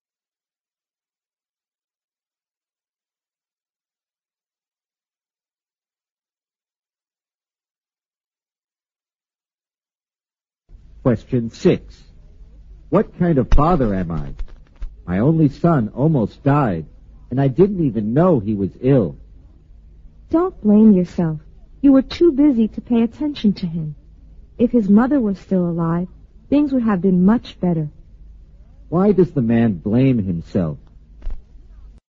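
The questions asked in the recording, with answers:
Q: Why does the man blame himself?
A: He didn't know his only son was ill, and the son almost died.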